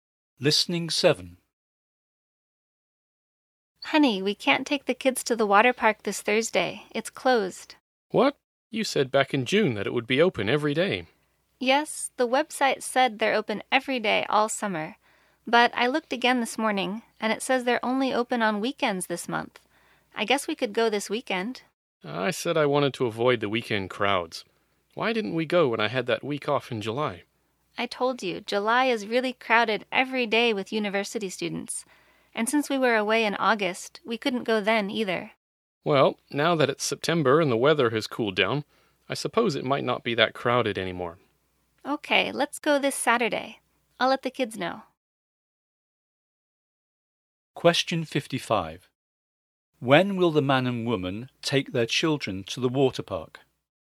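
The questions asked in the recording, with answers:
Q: When will the man and woman take their children to the water park?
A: This Saturday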